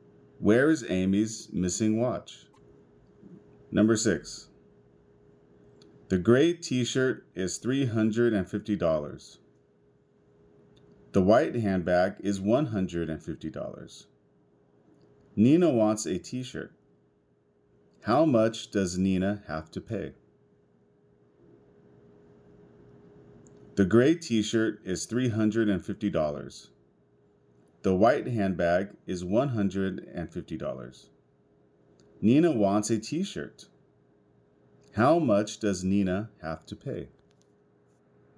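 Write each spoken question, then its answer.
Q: How much does Nina have to pay?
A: $350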